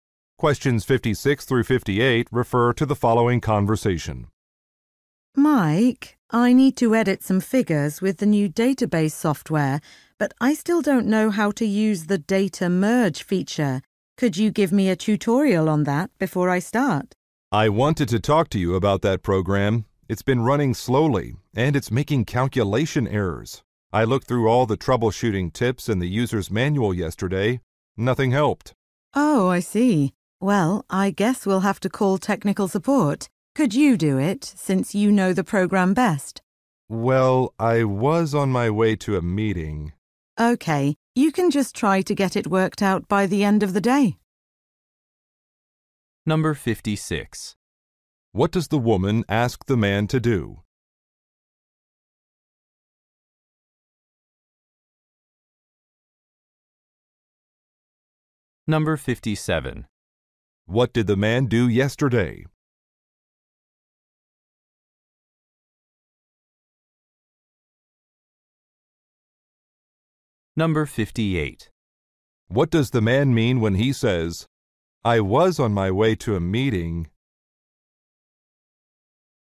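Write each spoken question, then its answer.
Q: What does the woman ask the man to do?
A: Give her a tutorial on the software.

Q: What did the man do yesterday?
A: Read the troubleshooting tips in the manual.

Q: What does the man mean when he says, I was on my way to a meeting?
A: He cannot call technical support now.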